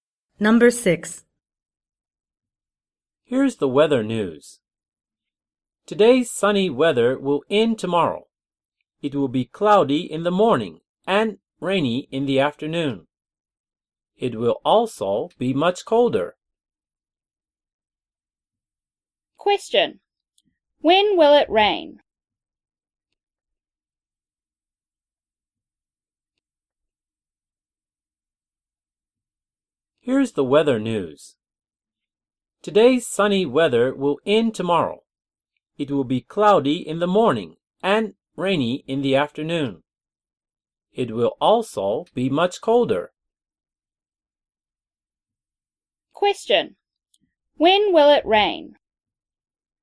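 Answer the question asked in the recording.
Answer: Tomorrow afternoon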